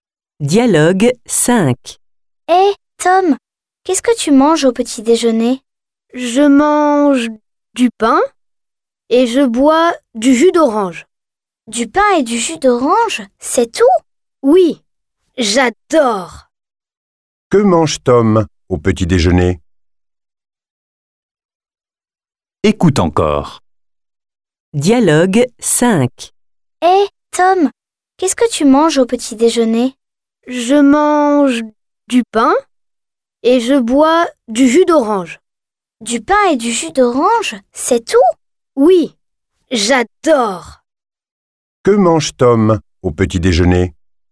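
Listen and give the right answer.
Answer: Du pain (et il boit du jus d'orange).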